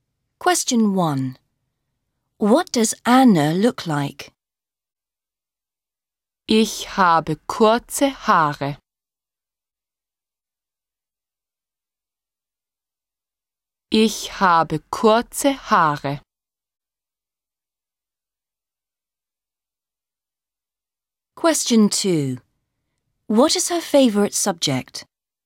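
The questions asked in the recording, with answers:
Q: What does Anna look like?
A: She has short hair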